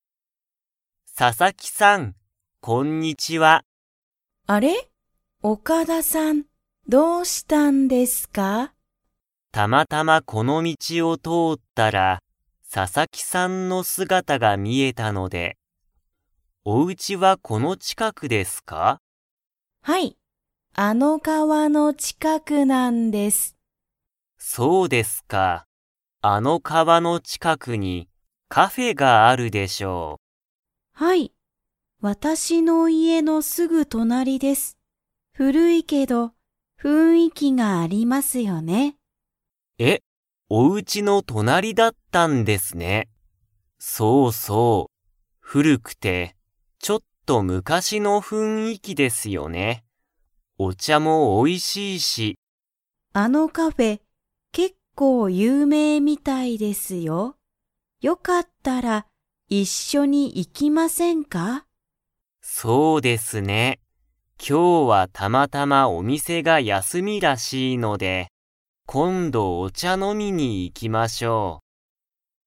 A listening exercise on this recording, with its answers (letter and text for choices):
Comprehension Quiz (Skip if you don't understand the conversation yet)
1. ササキさんの家いえの隣となりには、何なにがありますか?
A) オカダさんの家いえ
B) カフェ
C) スーパー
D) レストラン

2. カフェは今日きょう 。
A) 休やすみ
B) やっている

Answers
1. B) カフェ
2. A) 休やすみ

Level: Level 3